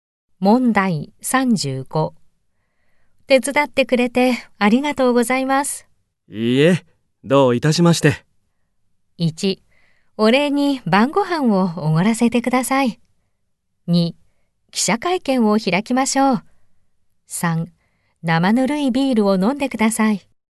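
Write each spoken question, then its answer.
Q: 手伝ってくれてありがとうございます。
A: 1: お礼に晩ご飯をおごらせてください。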